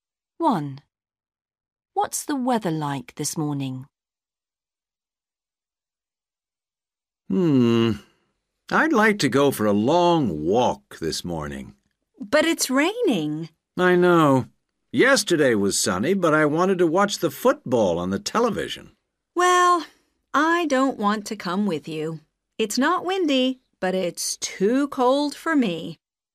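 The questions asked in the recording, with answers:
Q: What's the weather like this morning?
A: It's raining.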